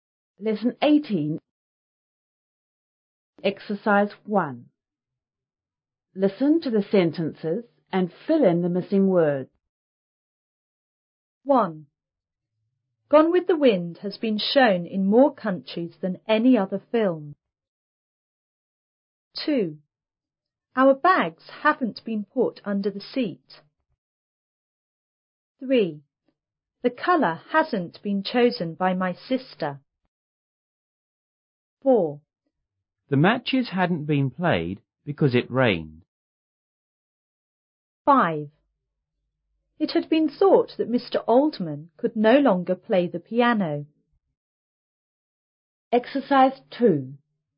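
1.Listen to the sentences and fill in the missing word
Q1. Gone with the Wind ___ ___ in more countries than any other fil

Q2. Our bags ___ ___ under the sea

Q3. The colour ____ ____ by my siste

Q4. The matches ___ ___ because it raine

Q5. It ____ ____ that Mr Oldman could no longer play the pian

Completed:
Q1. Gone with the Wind has been shown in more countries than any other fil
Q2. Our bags haven't been put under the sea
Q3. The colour hasn't been chosen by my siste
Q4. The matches hadn't been played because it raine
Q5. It had been thought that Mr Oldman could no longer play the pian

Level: 初中英语广州版5B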